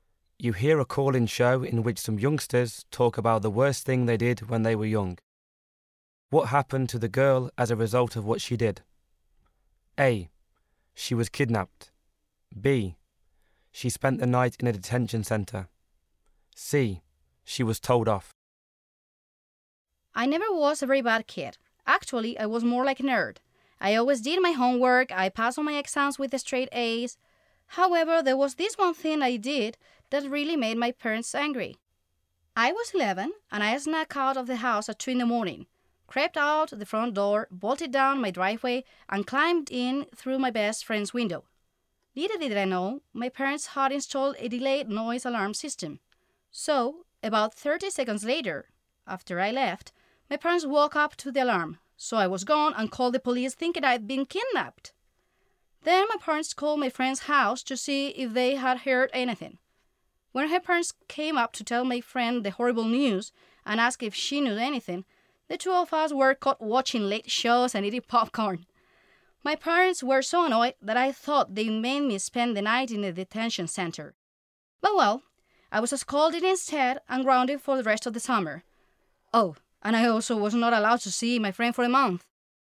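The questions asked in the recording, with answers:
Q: What happened to the girl as a result of what she did?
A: C: She was told off.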